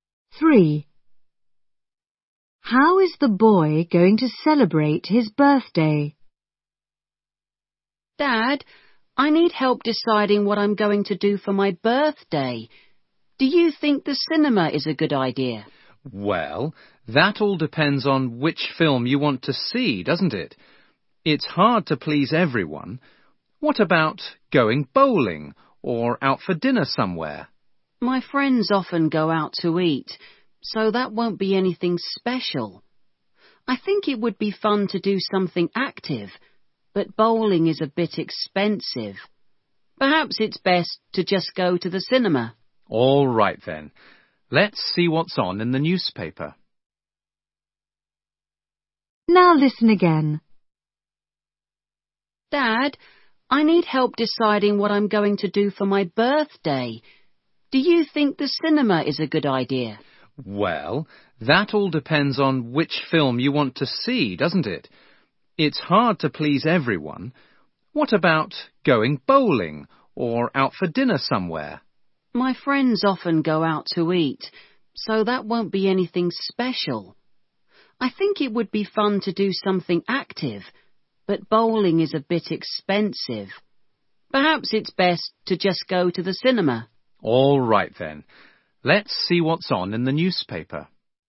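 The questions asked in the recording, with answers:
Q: How is the boy going to celebrate his birthday?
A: By going to the cinema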